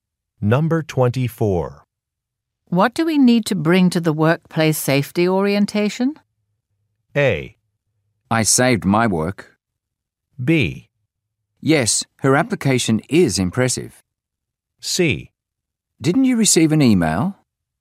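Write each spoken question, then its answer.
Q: What do we need to bring to the workplace safety orientation?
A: C: Didn't you receive an email?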